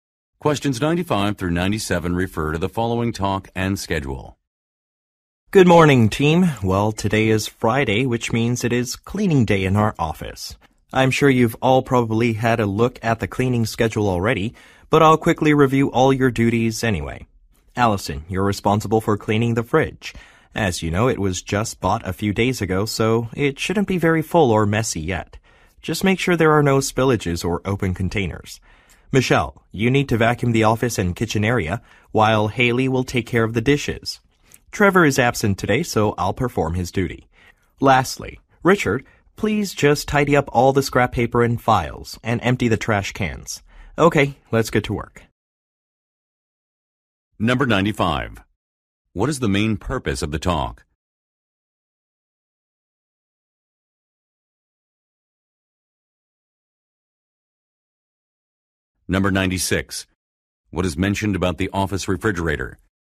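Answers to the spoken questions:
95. To review cleaning duties
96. It was bought a few days ago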